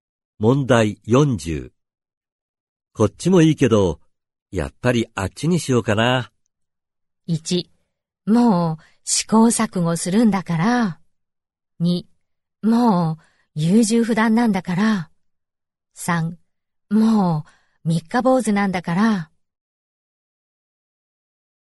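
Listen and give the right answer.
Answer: 2: もう優柔不断なんだから。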